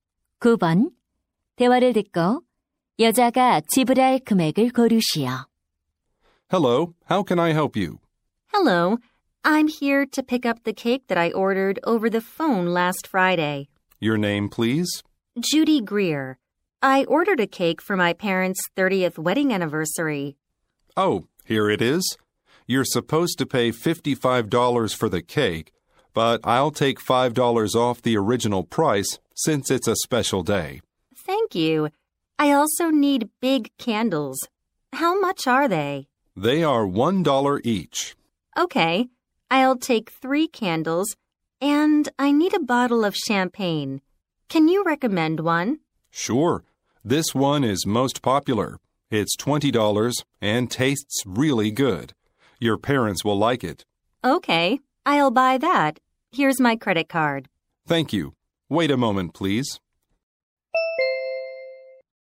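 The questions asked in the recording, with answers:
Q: 대화를 듣고 여자가 지불할 금액을 고르시오.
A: $73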